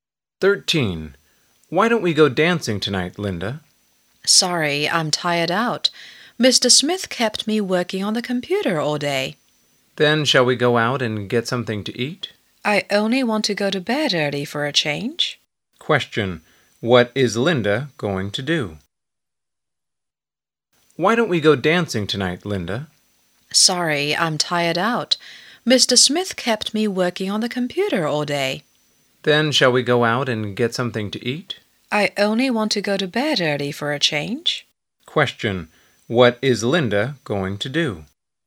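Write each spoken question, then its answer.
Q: What is Linda going to do?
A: Go to bed early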